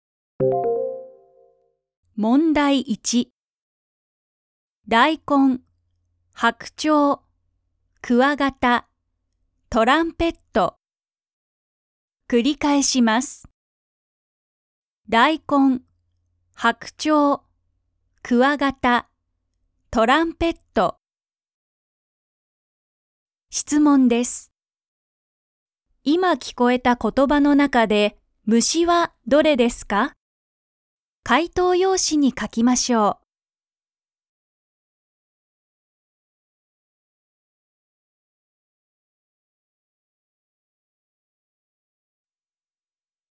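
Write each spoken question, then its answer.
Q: 今聞こえた言葉の中で、虫はどれですか?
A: クワガタ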